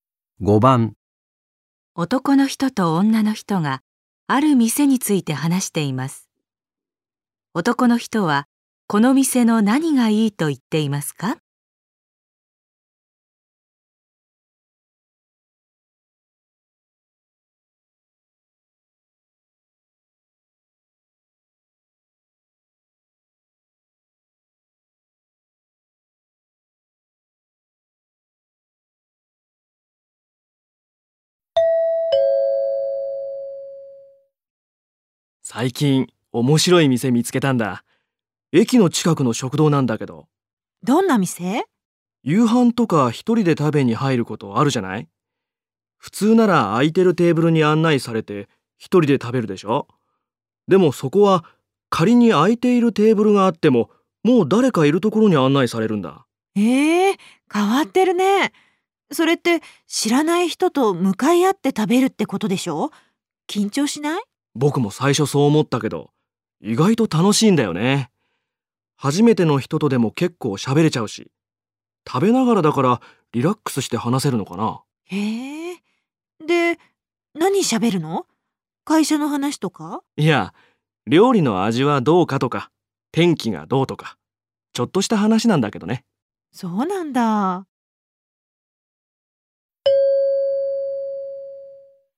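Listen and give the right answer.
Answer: 知らない人と同じテーブルで気軽に話しながら食べられること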